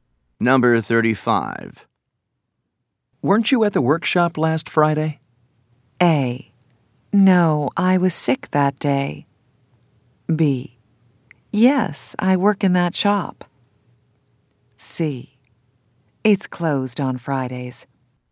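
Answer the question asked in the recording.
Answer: A: No, I was sick that day.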